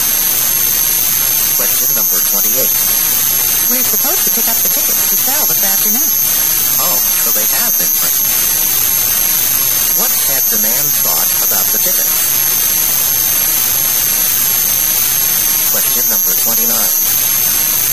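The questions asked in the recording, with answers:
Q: What had the man thought about the tickets?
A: That they hadn't been printed yet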